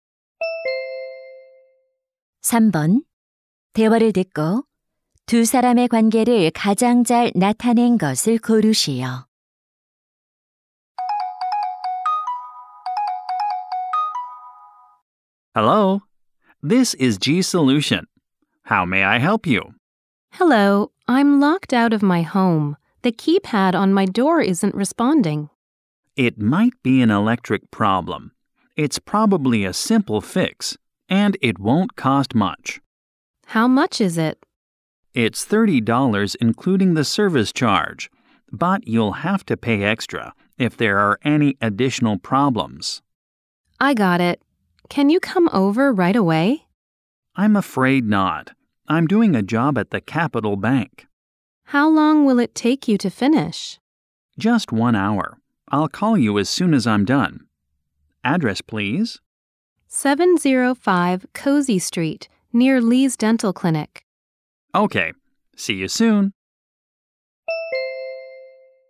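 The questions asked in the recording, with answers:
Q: 대화를 듣고 두 사람의 관계를 가장 잘 나타낸 것을 고르시오.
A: 고객 — 도어락 수리 기사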